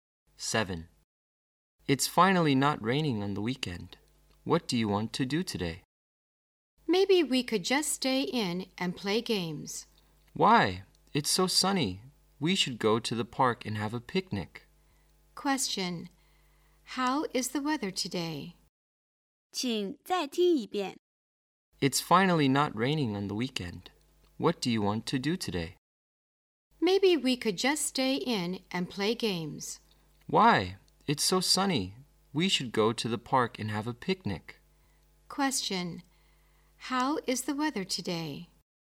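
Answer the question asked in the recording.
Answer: Sunny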